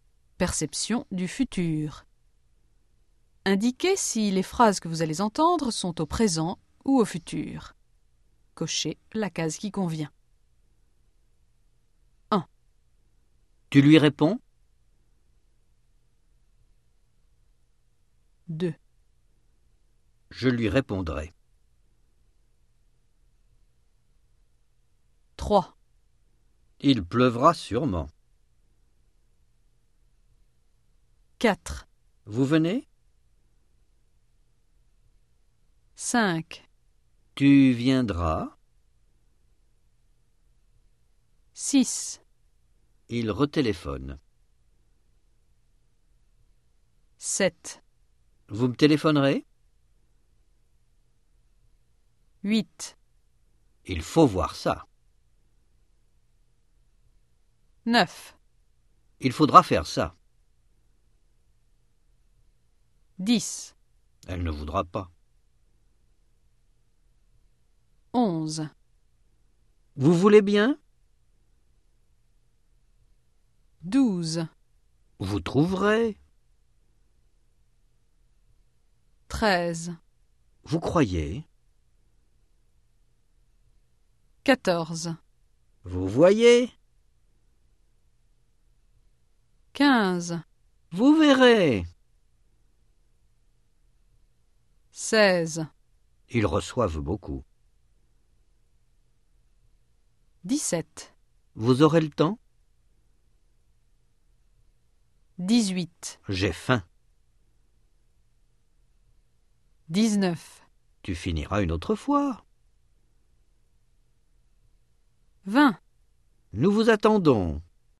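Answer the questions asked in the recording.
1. présent
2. futur
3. futur
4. présent
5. futur
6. présent
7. futur
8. présent
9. futur
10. futur
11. présent
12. futur
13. présent
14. présent
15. futur
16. présent
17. futur
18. présent
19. futur
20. présent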